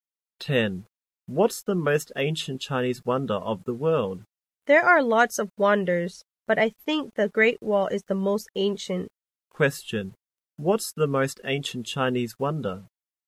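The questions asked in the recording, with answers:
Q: What's the most ancient Chinese wonder?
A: The Great Wall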